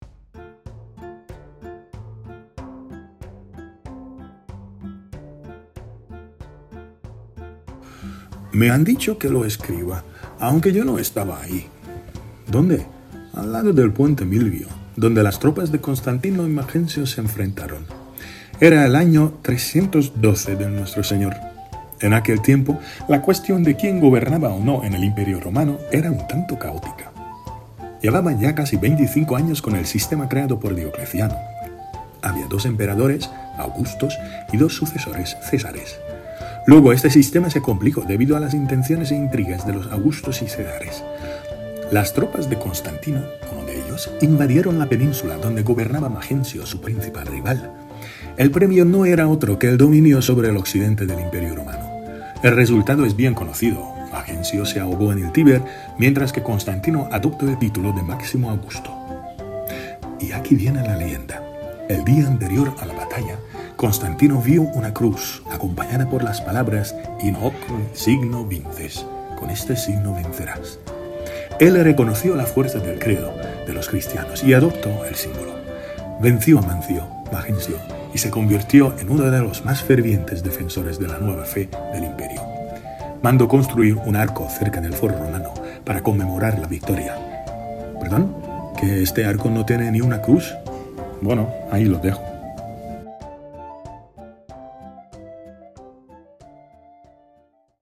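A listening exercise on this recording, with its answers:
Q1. ¿Por qué puso emperador Constantino el signo de los cristianos en su escudo?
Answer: Porque el día anterior a la batalla vio una cruz con las palabras «In hoc signo vinces» («Con este signo vencerás») y reconoció la fuerza del credo cristiano.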